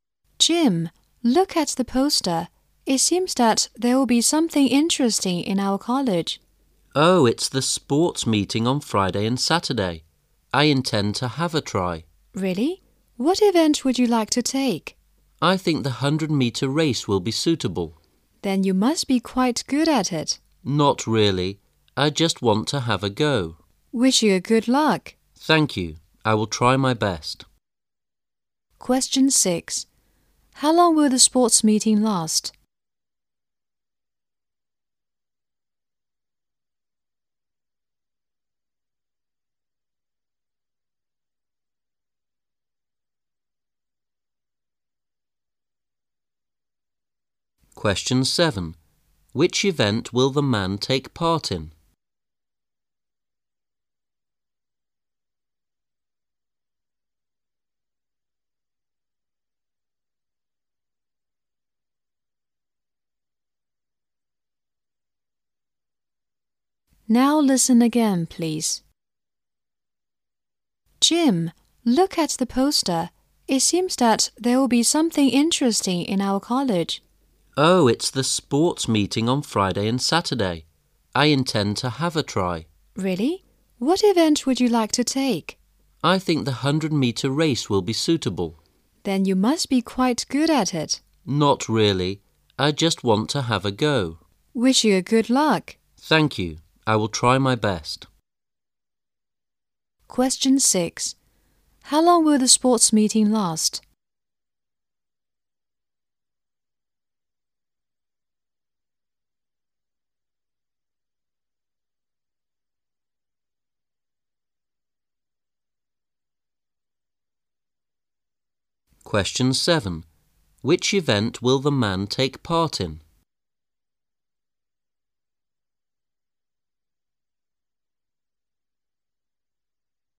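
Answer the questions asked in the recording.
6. Two days (Friday and Saturday)
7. The 100-meter race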